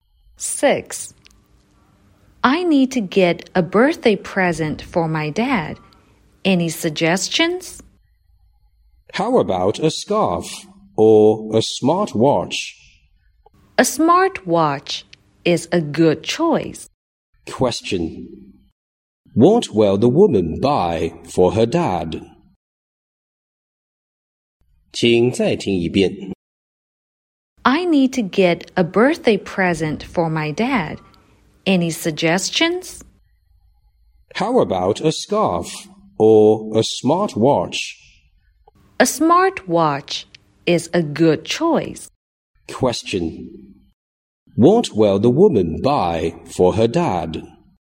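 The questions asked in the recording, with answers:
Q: What will the woman buy for her dad?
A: A smart watch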